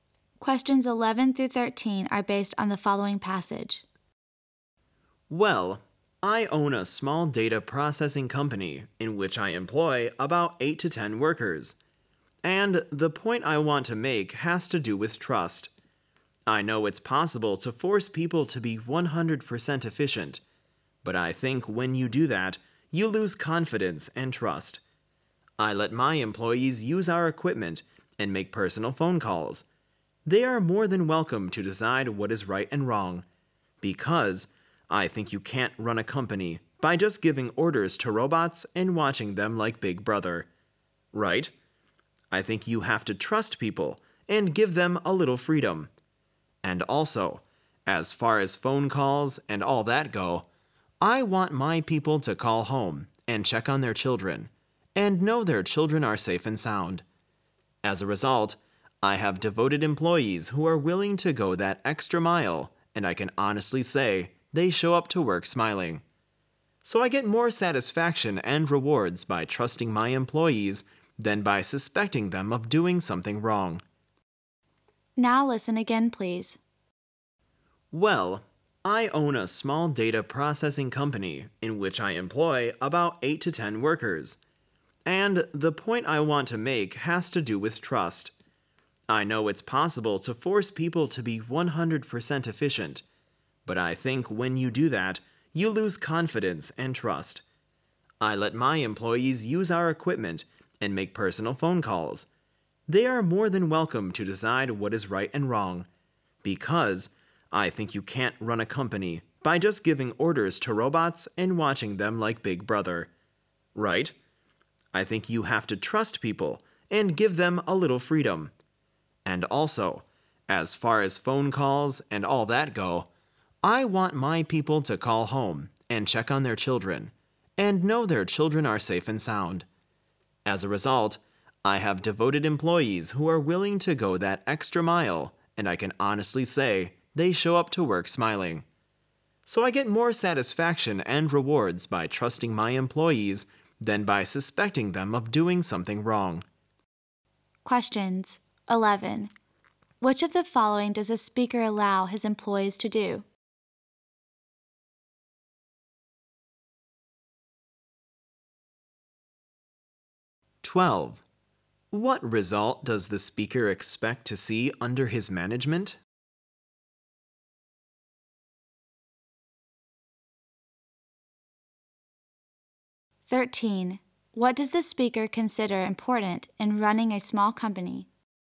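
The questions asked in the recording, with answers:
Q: Which of the following does a speaker allow his employees to do?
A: Use the company equipment and make personal phone calls

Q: What result does the speaker expect to see under his management?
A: Devoted employees who are happy at work

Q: What does the speaker consider important in running a small company?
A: Trusting employees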